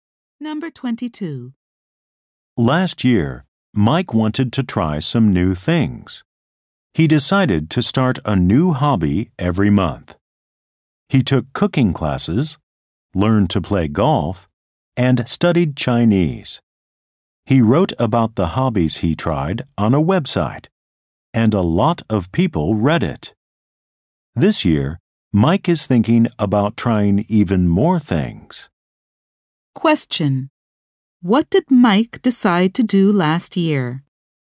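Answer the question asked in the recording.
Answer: Start a new hobby every month.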